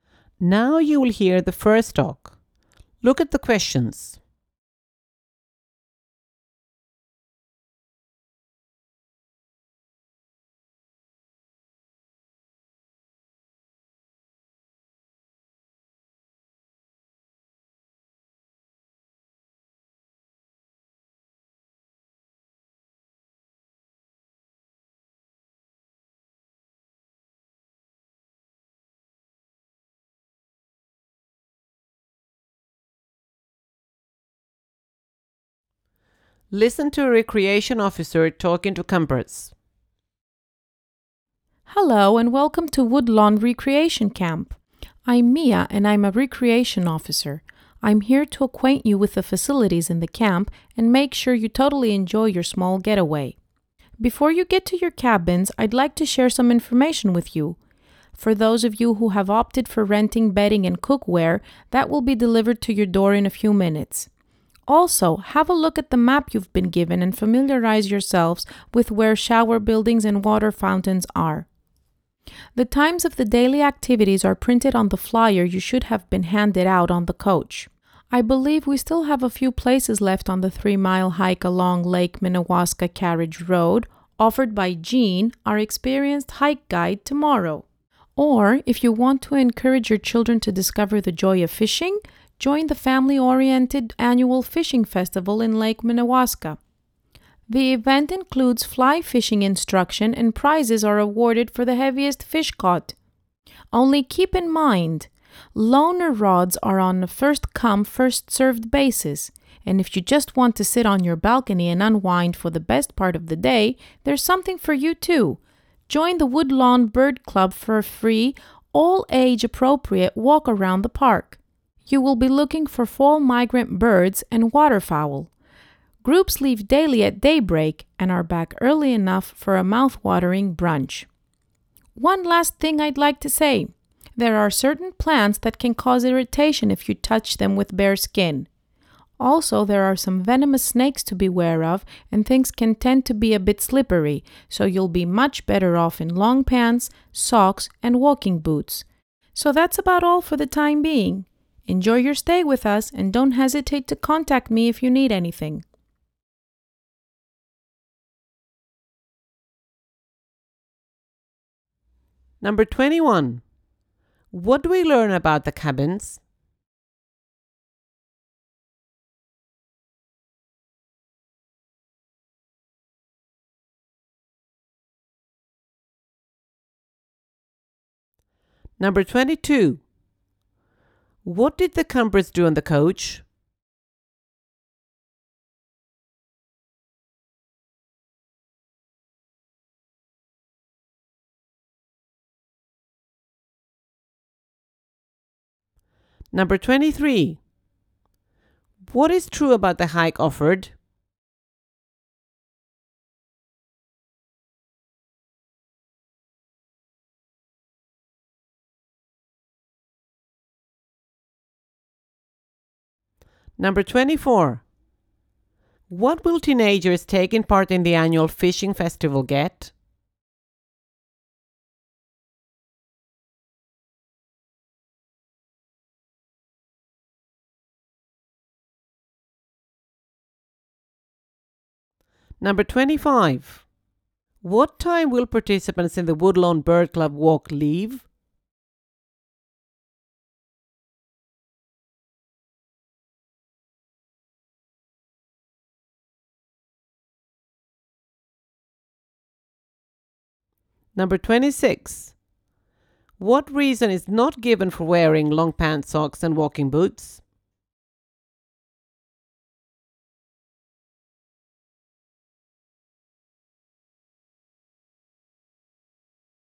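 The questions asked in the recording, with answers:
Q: What time will participants in the Woodlawn Bird Club walk leave?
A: At daybreak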